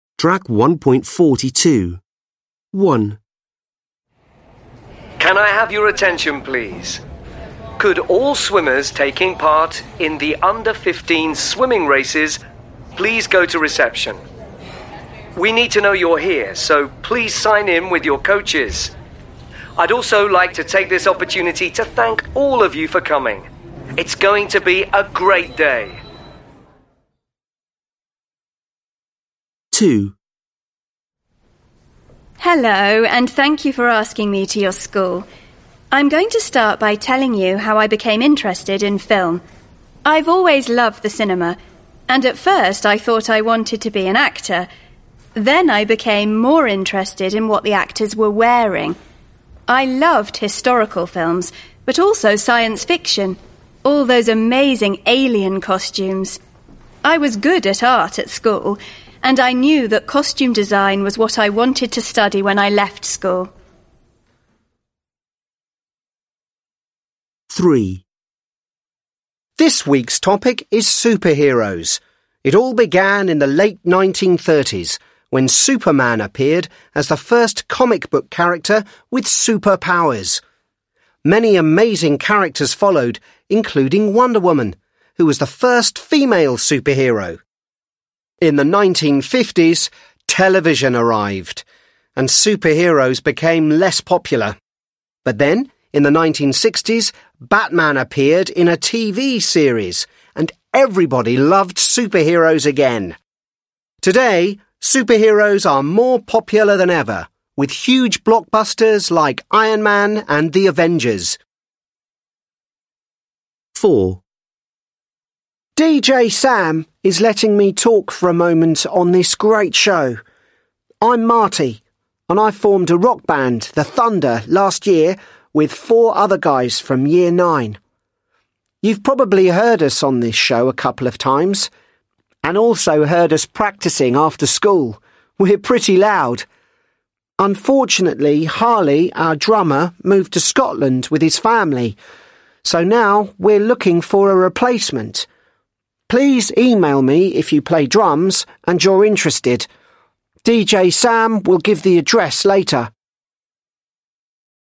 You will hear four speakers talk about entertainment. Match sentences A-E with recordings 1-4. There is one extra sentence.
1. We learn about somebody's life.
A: 2

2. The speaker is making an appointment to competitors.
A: 1

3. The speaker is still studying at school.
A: 4

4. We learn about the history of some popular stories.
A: 3

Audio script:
1. Can I have your attention please? Could all swimmers taking part in the under-fifteen swimming races please go to reception. We need to know you're here so please sign name with your coaches. I'd also like to take this opportunities to thank all of you for coming. It's going to be a great day.
Hello and thank you for asking me to your school. I'm going to start by telling you how I became interested in film. I've always love the cinema and at first, I thought I wanted to be an actor then I became more interested in what the actors were wearing. I love hstorical films but also science fiction, all the amazing alien costumes . I was good at art school. And I knew the costume design was what I wanted to study when I left school.
This week's topic is Superheroes. It all began in the late 1930 when Superman appeared as the first comic book character with super powers. Many amazing characters followed including one woman who is the first female superhero. In the 1950s, television arrived and Superheroes became less popular, but then, in the 1960, Batman appeared in a TV series and everybody loves Superheroes again. Today, Superheroes are more popular than ever with huge blcokbusters like Iron man and The Advenger.
4. DJ Sam is letting me talk for a moment to OS show. I'm Marthew, and I formed the rock band The Thunder last year with four other guys from year nine.

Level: Lớp 10